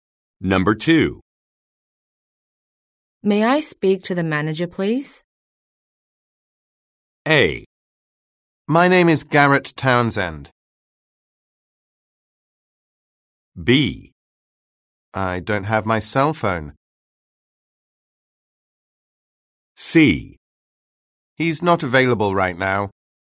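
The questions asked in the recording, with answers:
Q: May I speak to the manager, please?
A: C: He's not available right now.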